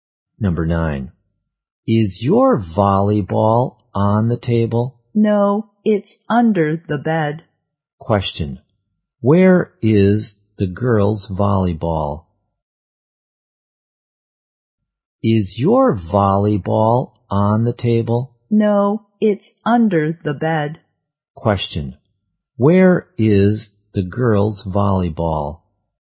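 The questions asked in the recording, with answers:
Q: Question. Where is the girls' volleyball?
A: Under the bed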